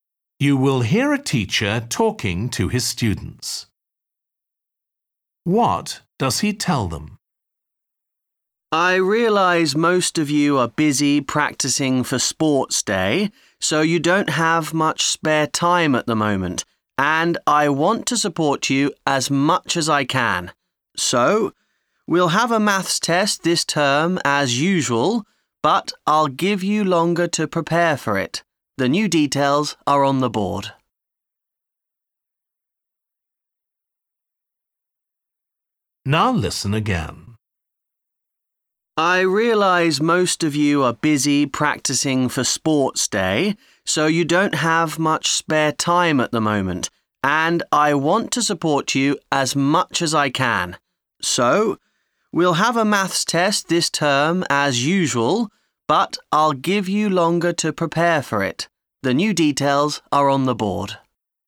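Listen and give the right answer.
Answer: The maths test will be later, giving them longer to prepare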